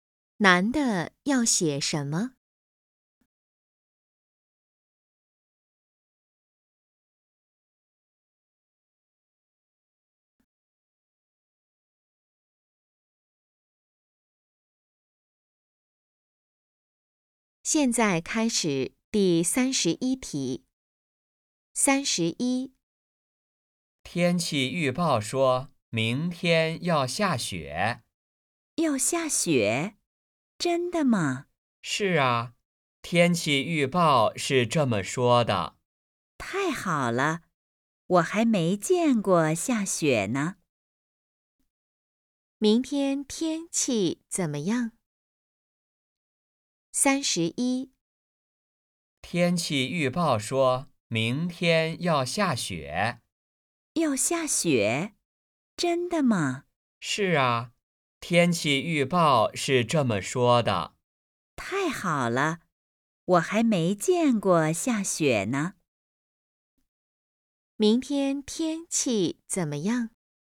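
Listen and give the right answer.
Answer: 下雪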